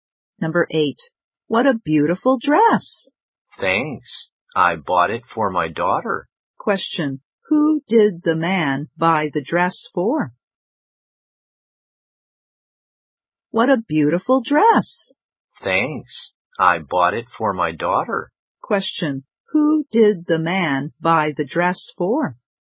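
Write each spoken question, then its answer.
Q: Question, who did the man buy the dress for?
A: His daughter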